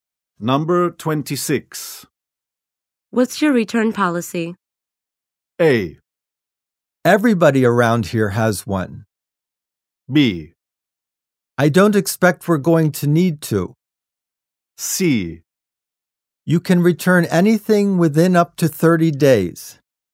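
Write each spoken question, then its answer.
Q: What's your return policy?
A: C: You can return anything within up to 30 days.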